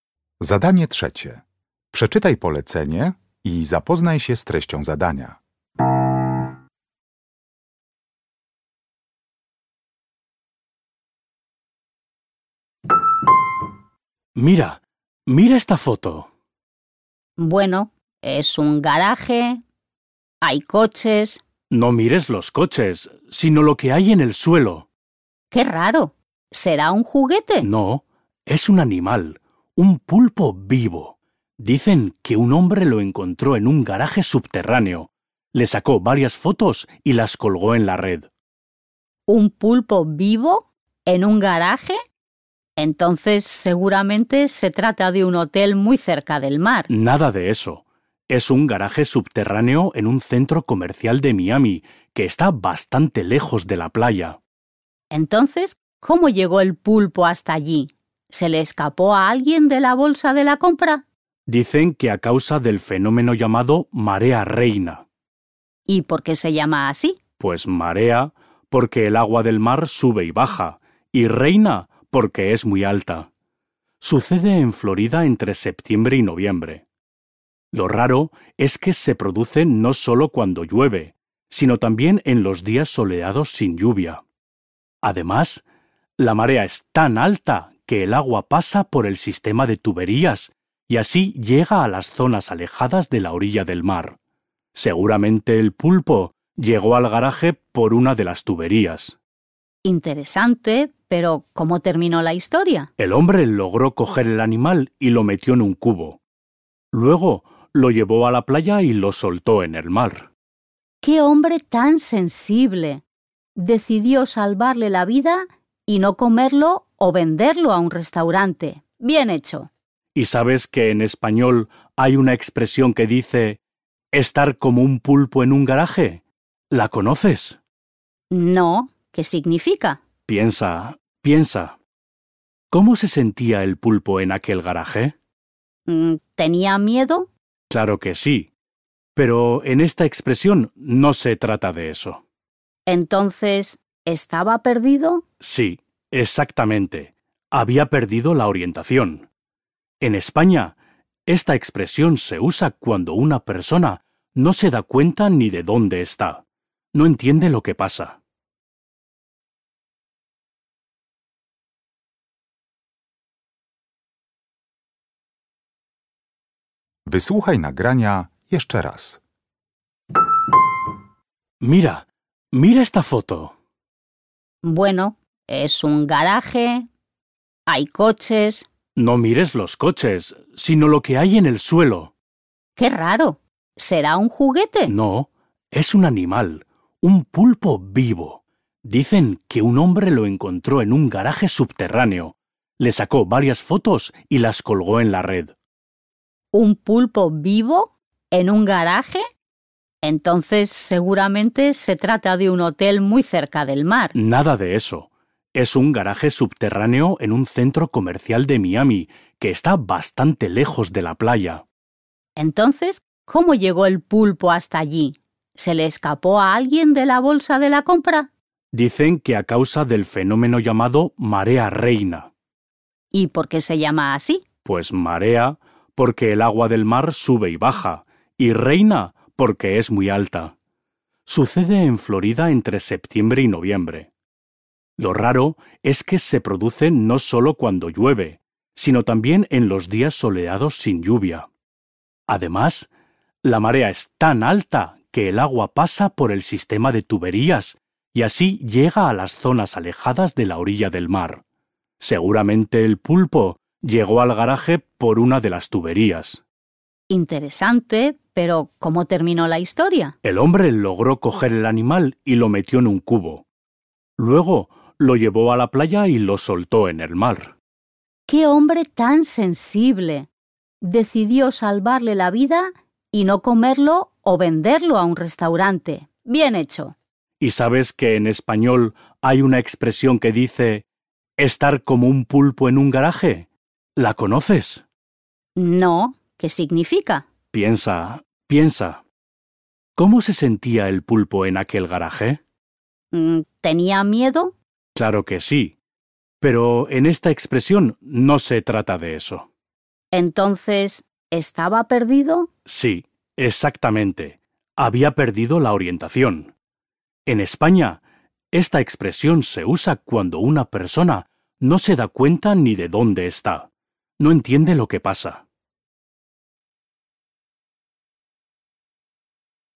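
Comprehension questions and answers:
Uruchamiając odtwarzacz z oryginalnym nagraniem CKE usłyszysz dwukrotnie rozmowę dotyczącą ośmiornicy (el pulpo). Na podstawie informacji zawartych w nagraniu uzupełnij luki w zdaniach 3.1.–3.4., tak aby jak najbardziej precyzyjnie oddać sens wysłuchanego tekstu. Luki należy uzupełnić w języku hiszpańskim.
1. El garaje subterráneo donde el hombre encontró el pulpo está situado en de Miami.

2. Lo sorprendente es que la marea reina se produce también cuando .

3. El hombre que encontró el pulpo decidió , y eso le gustó mucho a la chica.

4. La expresión "estar como un pulpo en un garaje" significa que alguien está completamente .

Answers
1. un centro comercial
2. no llueve / hace sol
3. salvarle la vida (soltarlo en el mar)
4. perdido

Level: Poziom: podstawowy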